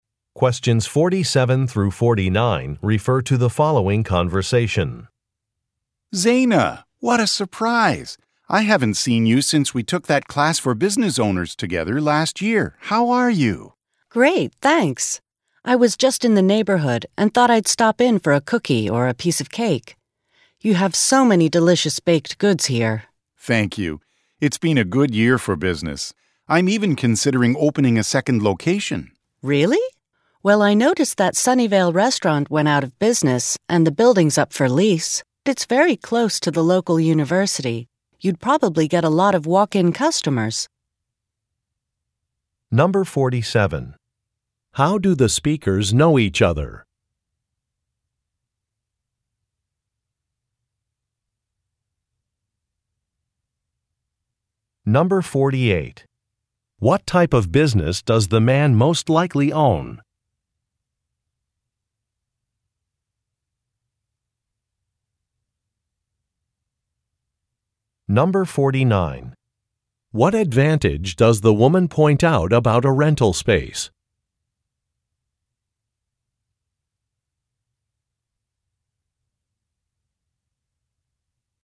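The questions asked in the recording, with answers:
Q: How do the speakers know each other?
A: They took a class for business owners together

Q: What type of business does the man most likely own?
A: A bakery

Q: What advantage does the woman point out about a rental space?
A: It is close to a university, so it would get many walk-in customers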